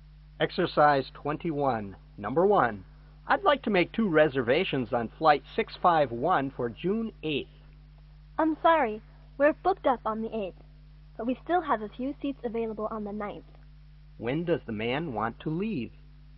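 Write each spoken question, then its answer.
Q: When does the man want to leave?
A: June 8th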